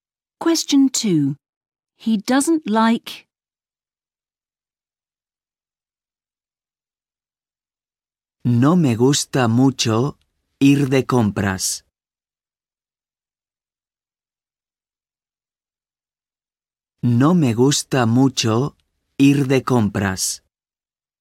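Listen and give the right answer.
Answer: going shopping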